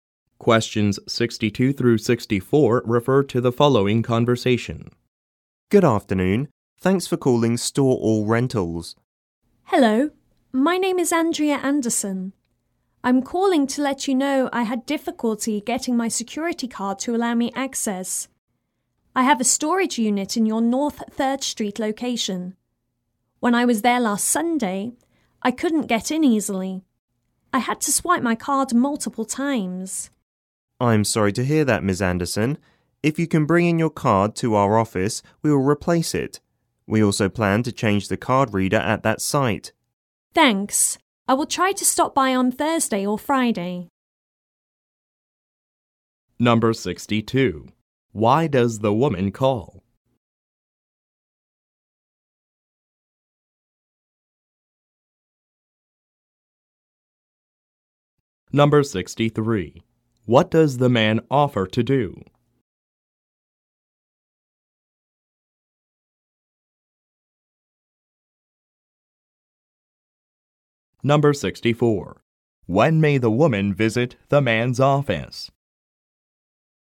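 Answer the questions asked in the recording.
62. To report trouble getting access with her security card
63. Replace her card
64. Thursday or Friday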